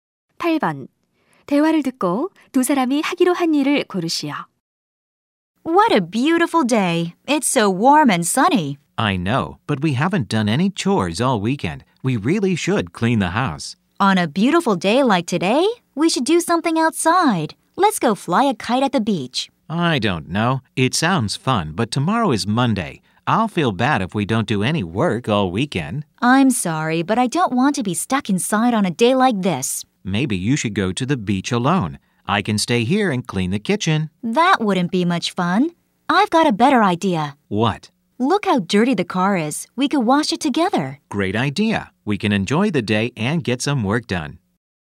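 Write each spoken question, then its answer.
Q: 대화를 듣고 두 사람이 하기로 한 일을 고르시오.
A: 함께 세차하기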